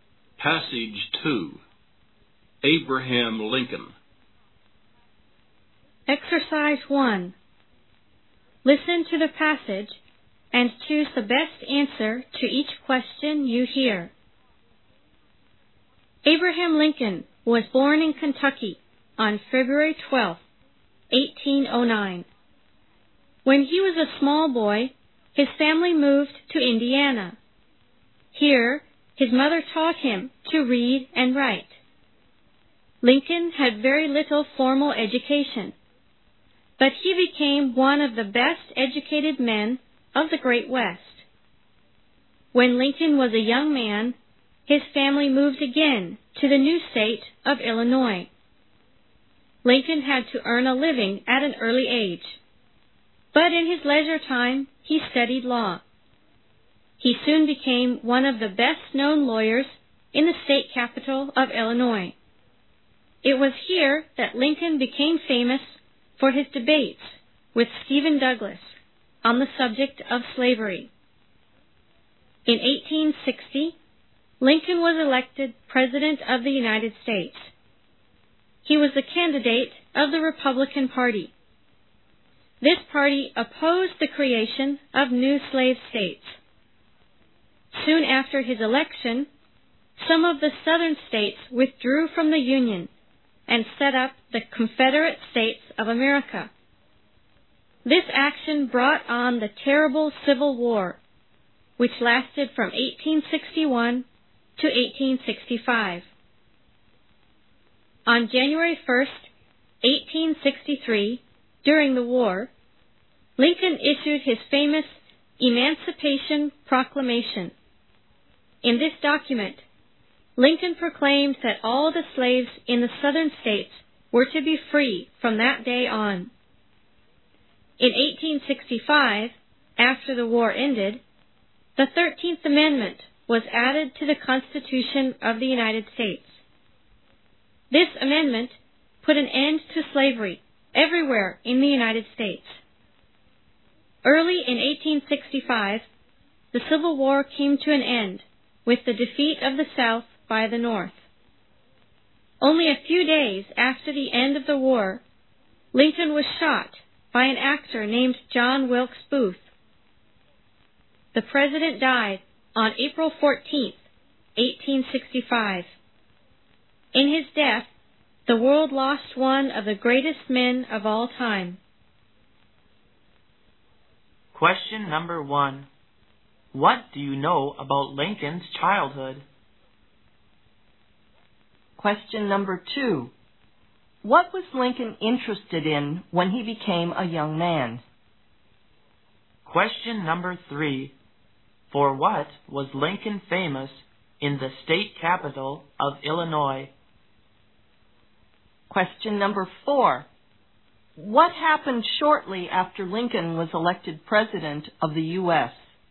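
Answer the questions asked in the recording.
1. His family moved to Indiana, where his mother taught him to read and write
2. Law
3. His debates with Stephen Douglas on slavery
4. Some southern states withdrew from the Union and set up the Confederate States of America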